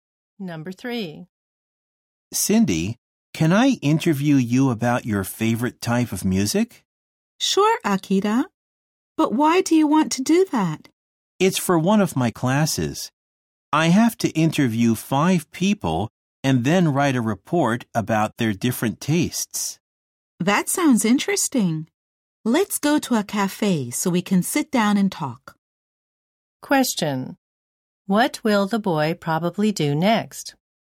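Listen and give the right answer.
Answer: Go to a cafe to interview Cindy.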